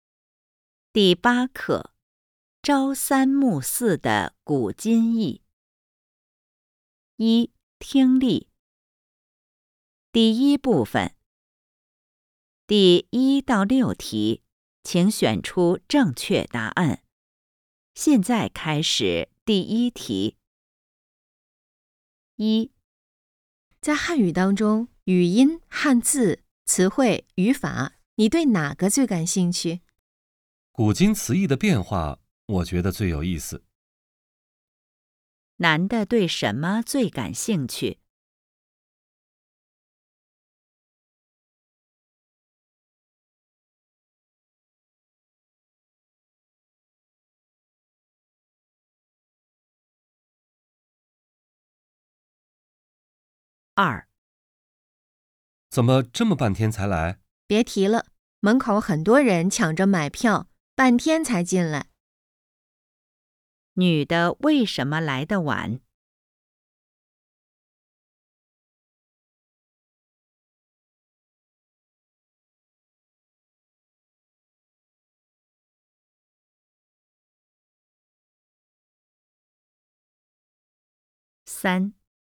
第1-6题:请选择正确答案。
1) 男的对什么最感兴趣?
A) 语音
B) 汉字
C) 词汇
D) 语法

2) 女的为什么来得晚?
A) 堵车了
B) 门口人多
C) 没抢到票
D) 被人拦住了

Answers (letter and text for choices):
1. C) 词汇
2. B) 门口人多

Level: HSK 5